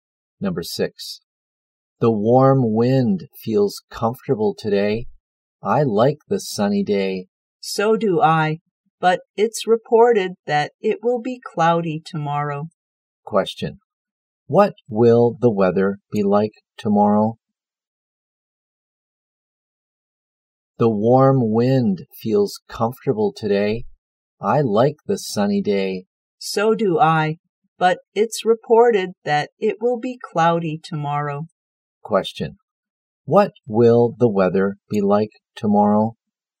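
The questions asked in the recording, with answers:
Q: What will the weather be like tomorrow?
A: Cloudy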